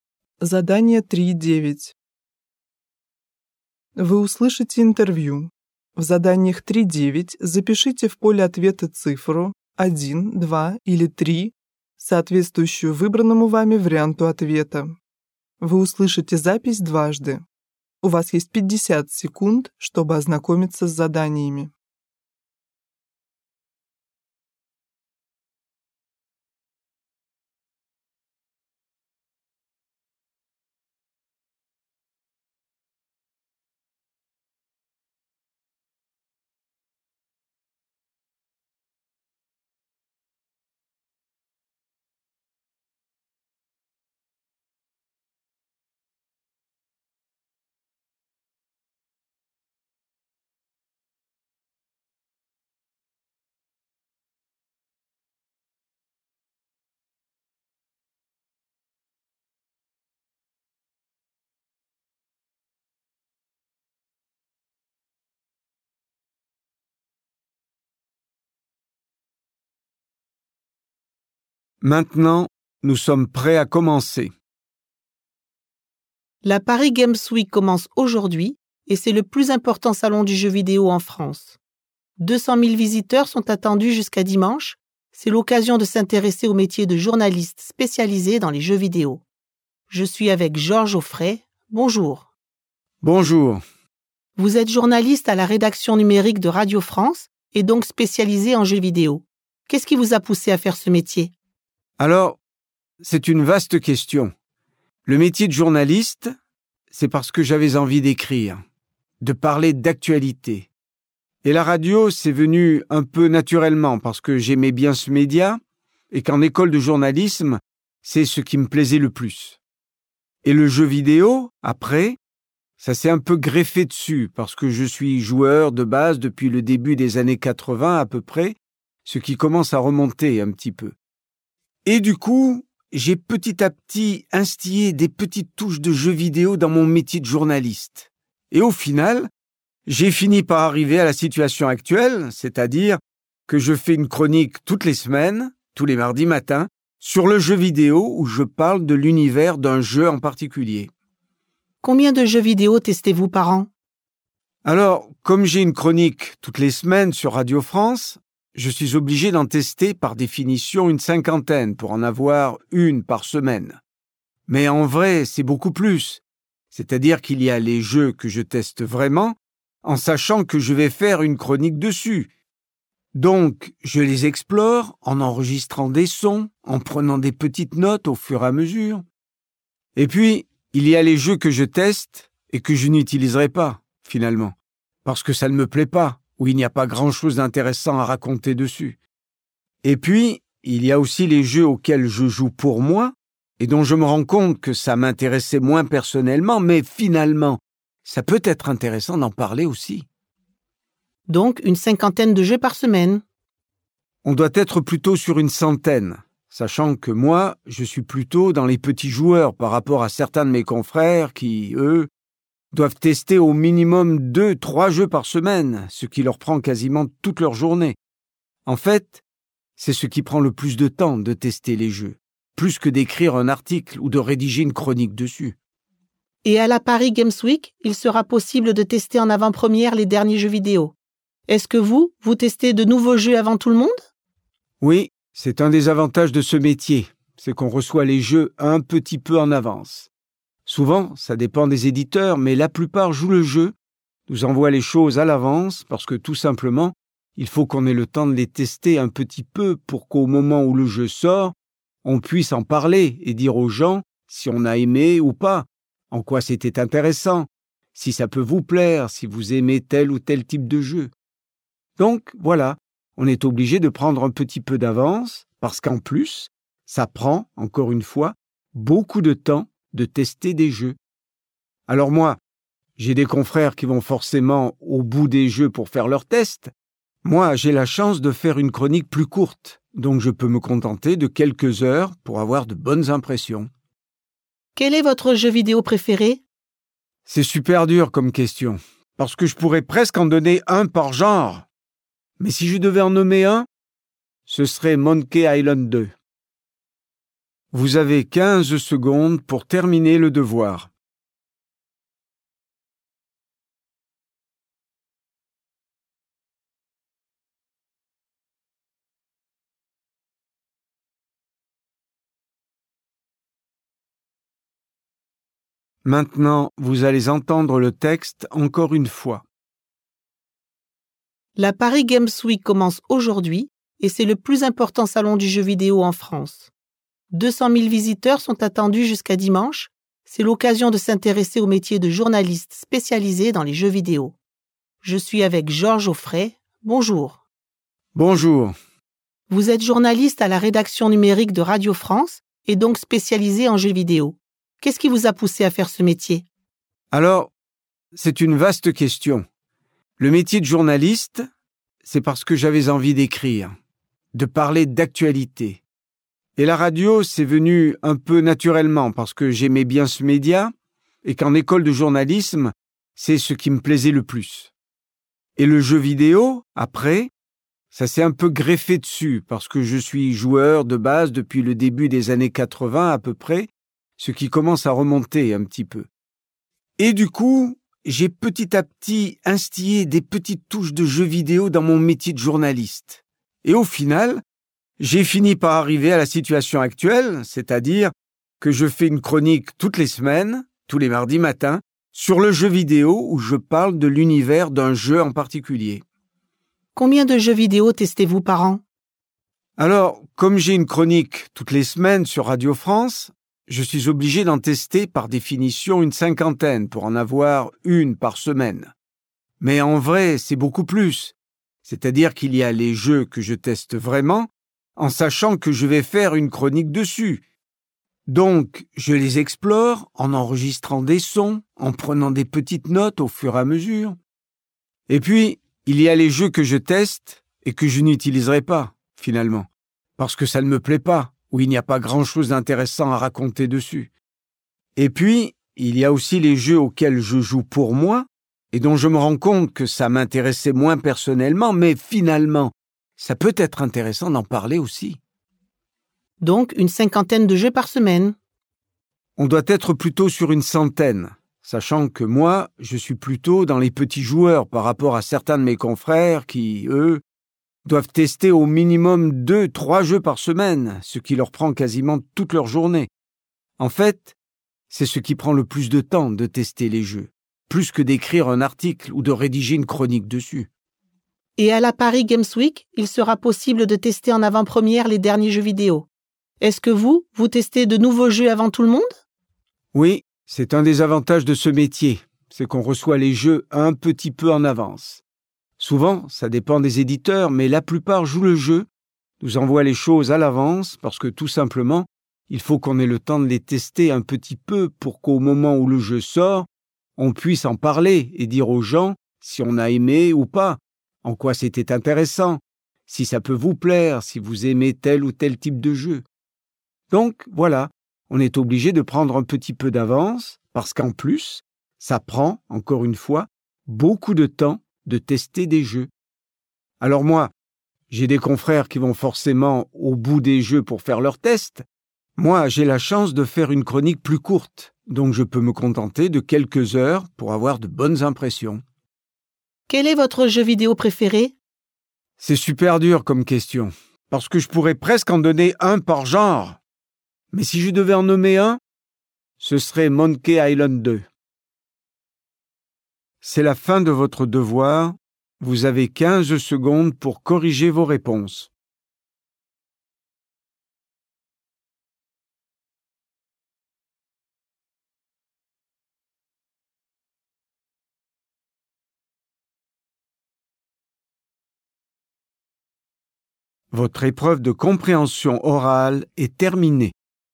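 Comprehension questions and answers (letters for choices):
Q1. À quelle occasion cette interview est-elle diffusée?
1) La sortie d'un livre sur les jeux.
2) Une exposition de jeux vidéo.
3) La remise des prix du jeu vidéo.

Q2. Georges Auffret s'est spécialisé en jeux vidéo car il a ...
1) programmé des jeux vidéo à l'école.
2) participé à des compétitions de jeux vidéo.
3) joué à des jeux vidéo dans sa jeunesse.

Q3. Dans son émission à la radio, Georges Auffret ...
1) présente les jeux vidéo au public.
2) invite les créateurs de jeux vidéo.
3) organise des débats entre les joueurs.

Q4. Georges Auffret explore un nouveau jeu en ...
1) mettant à l'écrit ses idées.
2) enregistrant une vidéo.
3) enregistrant des images.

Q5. À quelle activité Georges Auffret consacre-t-il le plus de son temps?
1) Écrire un article de presse.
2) Préparer une émission.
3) Tester les jeux vidéo.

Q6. Quel est l'avantage du métier de Georges Auffret?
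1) Rencontrer les éditeurs des jeux vidéo.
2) Tester les jeux avant leur sortie officielle.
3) Jouer à des jeux vidéo avec sa famille.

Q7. Georges Auffret passe quelques heures sur un jeu pour ...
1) se faire sa propre opinion sur le jeu.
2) voir comment le jeu se termine.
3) augmenter la durée de son émission.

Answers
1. 2
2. 3
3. 1
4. 1
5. 3
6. 2
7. 1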